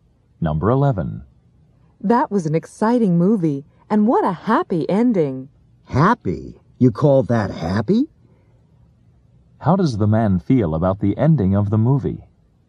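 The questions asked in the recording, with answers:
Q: How does the man feel about the ending of the movie?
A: He didn't think it was a happy ending.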